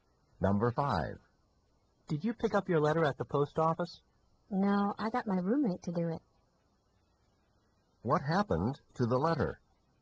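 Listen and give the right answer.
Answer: His roommate picked it up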